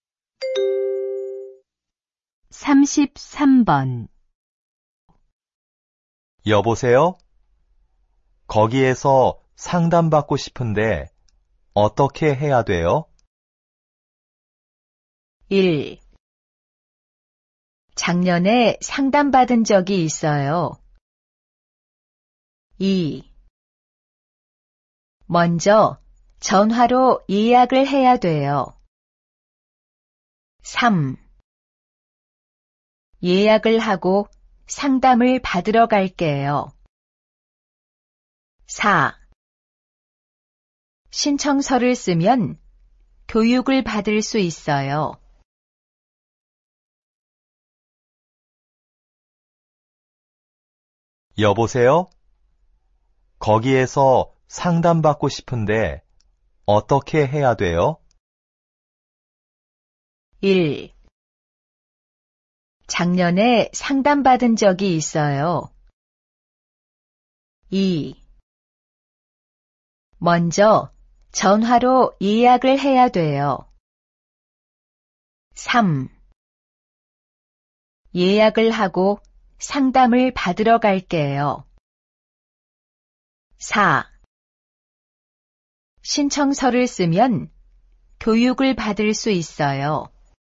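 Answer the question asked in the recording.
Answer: 2: 먼저 전화로 예약을 해야 돼요.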